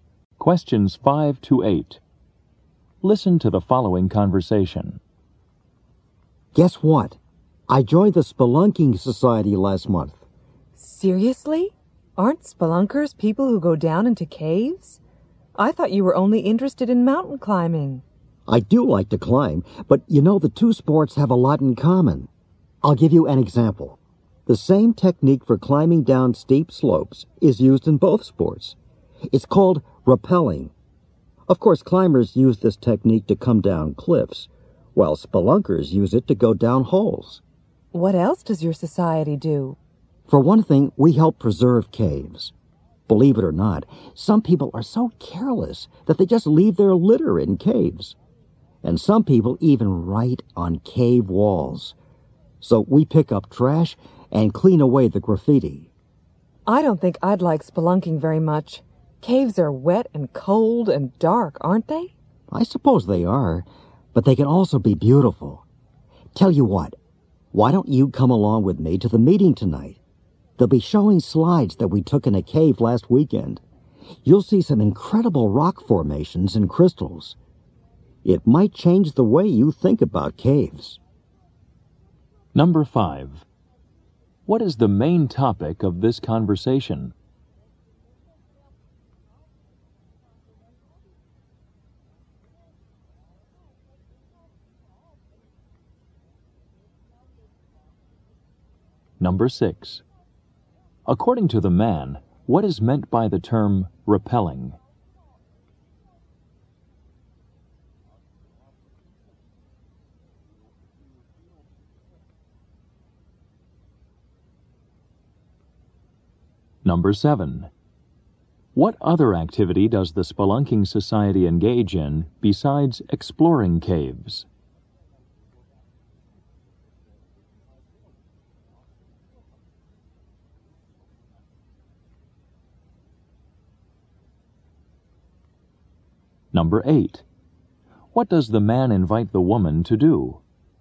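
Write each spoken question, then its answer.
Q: What is the main topic of this conversation?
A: Spelunking (cave exploring).

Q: According to the man, what is meant by the term repelling?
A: A technique for climbing down steep slopes.

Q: What other activity does the Spelunking Society engage in besides exploring caves?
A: Preserving caves by picking up trash and cleaning off graffiti.

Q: What does the man invite the woman to do?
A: Come to the meeting tonight to see slides of a cave.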